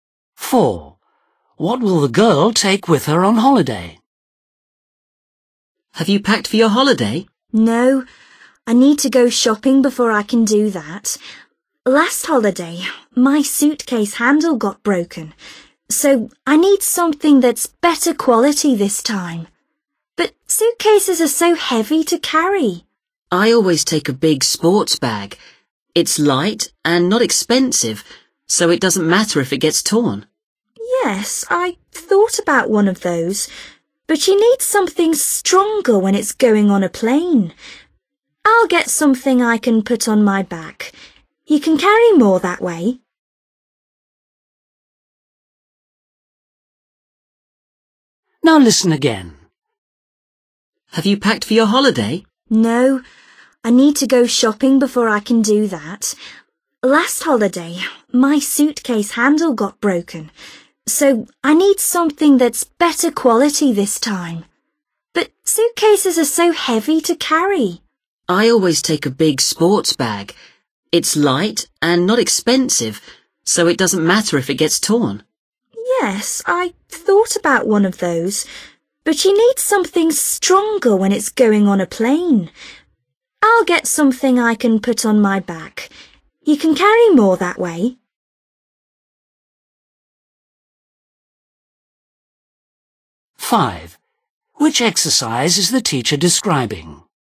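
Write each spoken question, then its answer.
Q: What will the girl take with her on holiday?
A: a backpack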